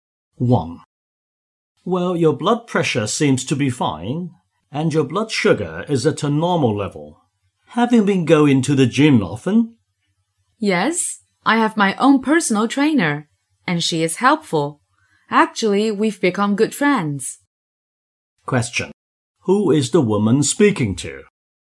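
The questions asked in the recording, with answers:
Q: Who is the woman speaking to?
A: A doctor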